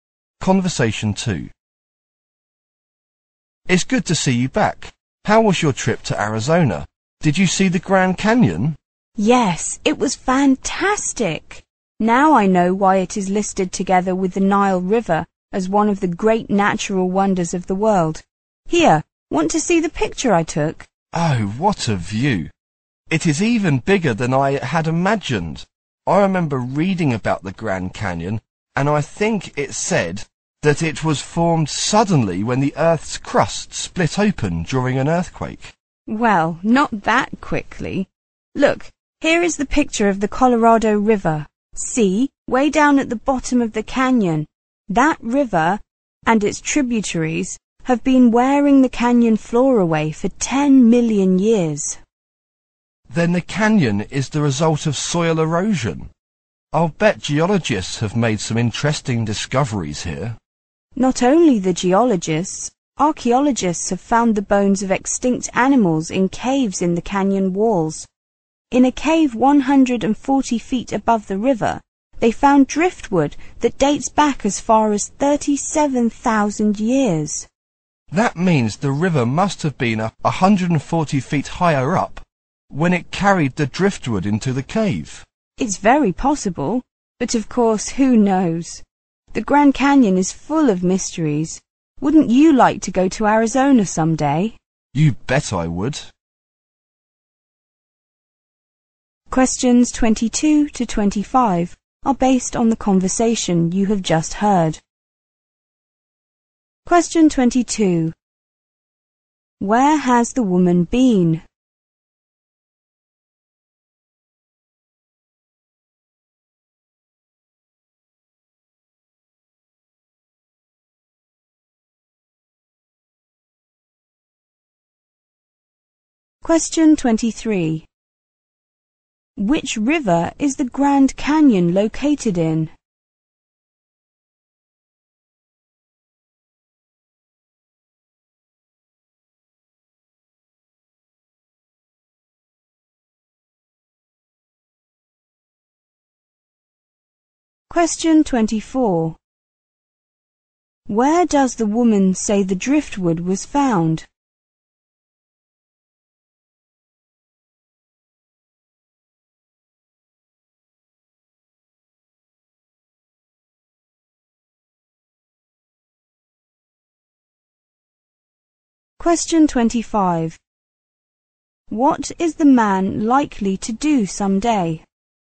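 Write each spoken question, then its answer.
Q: Where has the woman been?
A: Arizona (the Grand Canyon)

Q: Which river is the Grand Canyon located in?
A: The Colorado River

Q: Where does the woman say the driftwood was found?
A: In a cave 140 feet above the river

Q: What is the man likely to do someday?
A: Go to Arizona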